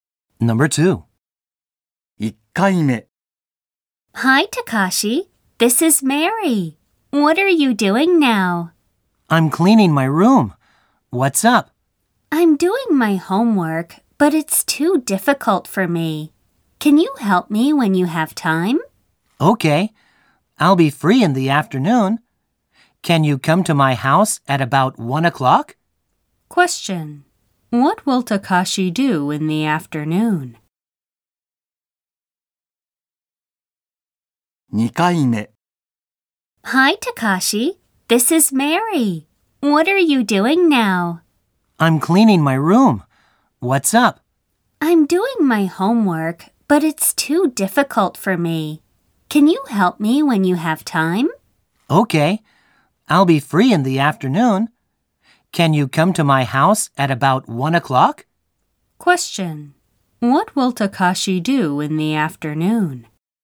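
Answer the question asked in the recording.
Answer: He will go to Mary's house and help her with her homework.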